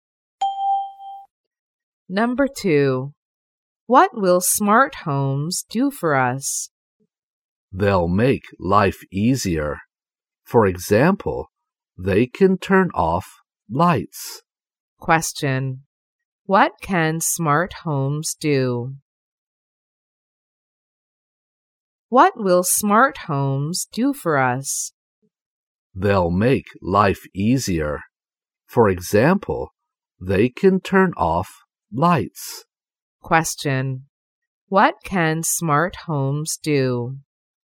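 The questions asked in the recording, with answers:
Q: What can smart homes do?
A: Make life easier, for example turn off lights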